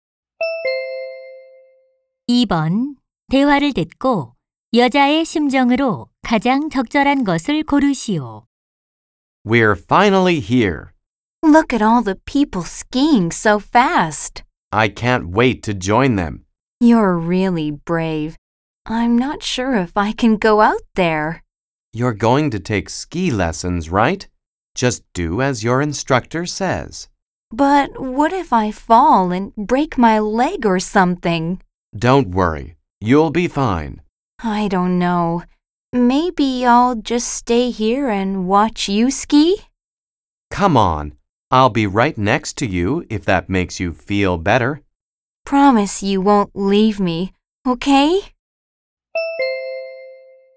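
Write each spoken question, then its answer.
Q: 대화를 듣고 여자의 심정으로 가장 적절한 것을 고르시오.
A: 불안하고 걱정스러움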